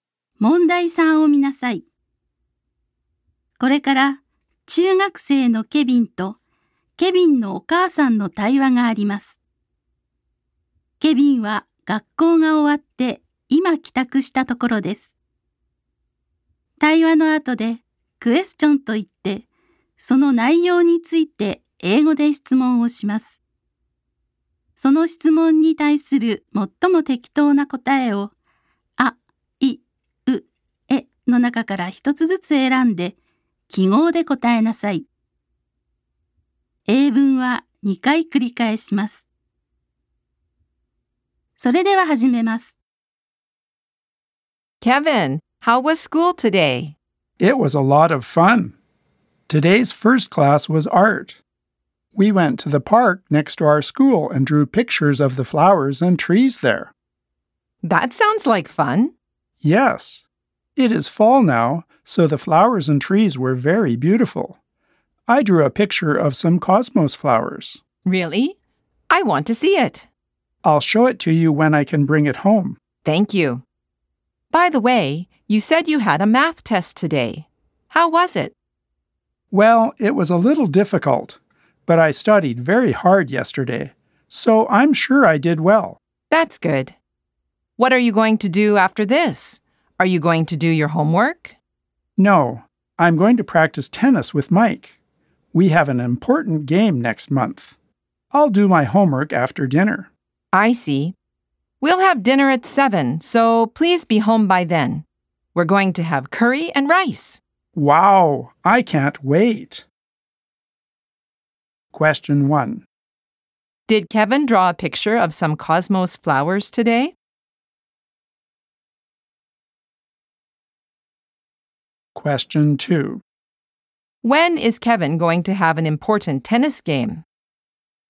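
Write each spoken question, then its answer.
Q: Did Kevin draw a picture of some cosmos flowers today?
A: Yes, he did.

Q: When is Kevin going to have an important tennis game?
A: Next month.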